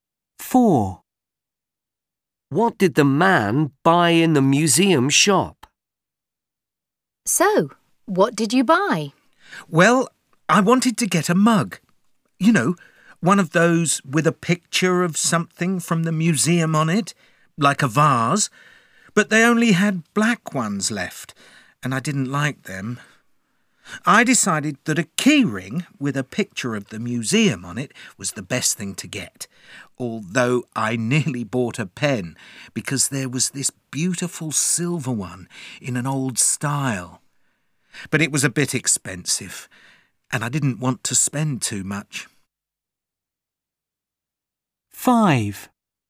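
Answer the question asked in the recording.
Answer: A key ring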